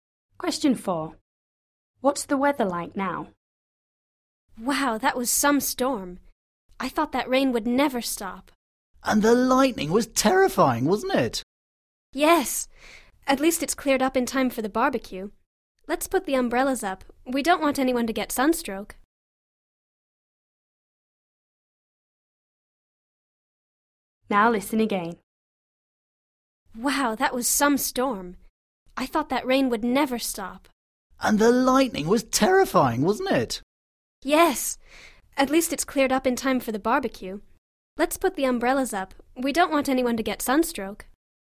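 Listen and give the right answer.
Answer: sunny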